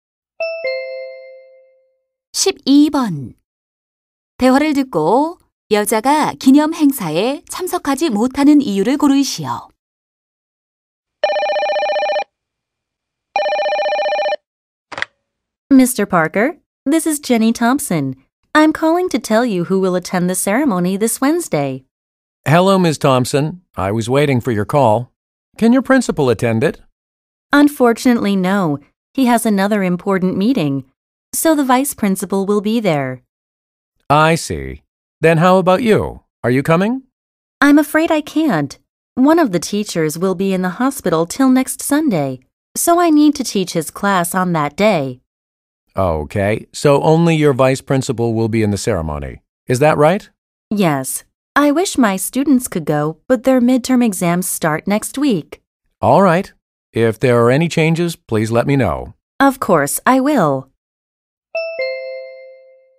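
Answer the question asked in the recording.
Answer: 입원한 동료 교사 대신 수업을 해야 해서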